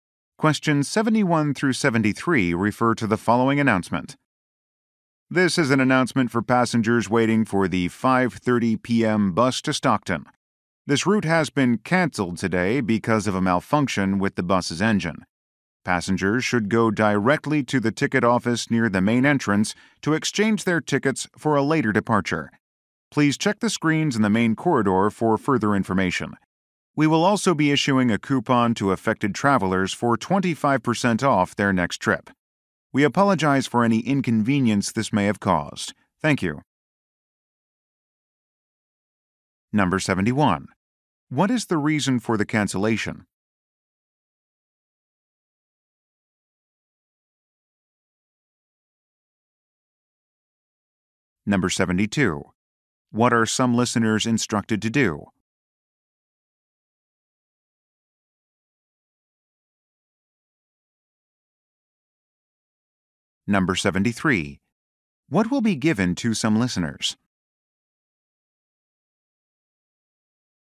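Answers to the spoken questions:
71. A problem with the bus's engine
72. Go to the ticket office to exchange their tickets
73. A coupon for 25% off their next trip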